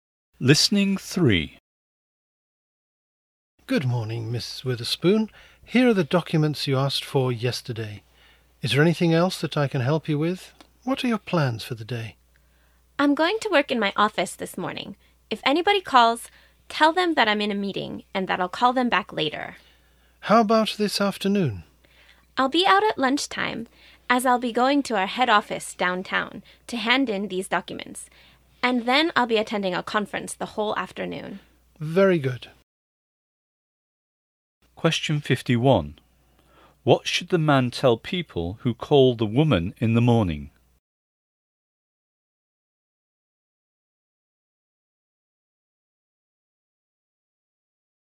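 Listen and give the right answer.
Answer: That she is in a meeting and will call them back later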